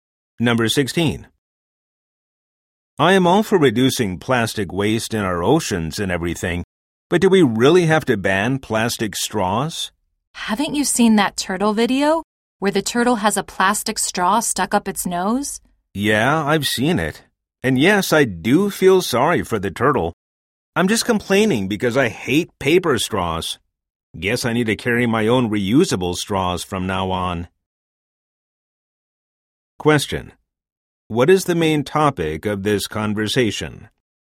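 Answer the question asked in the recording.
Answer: Banning plastic straws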